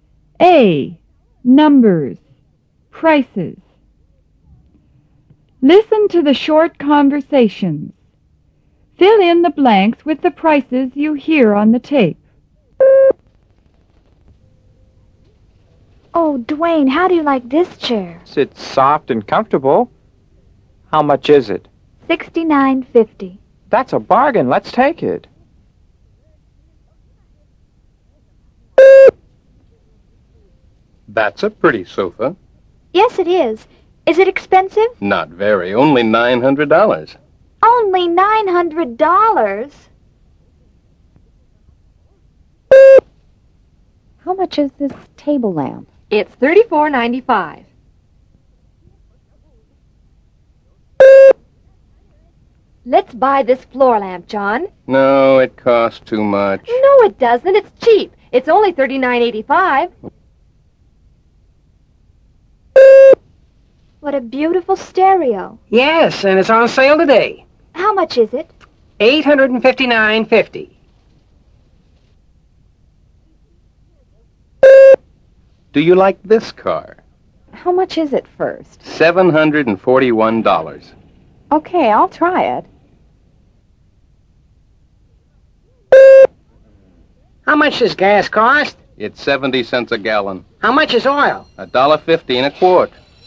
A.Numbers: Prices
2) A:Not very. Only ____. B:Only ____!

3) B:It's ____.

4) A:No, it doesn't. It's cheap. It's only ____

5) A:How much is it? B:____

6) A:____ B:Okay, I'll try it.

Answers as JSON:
{"2": "$900 $900", "3": "$34.95", "4": "$39.85", "5": "$859.50", "6": "$741"}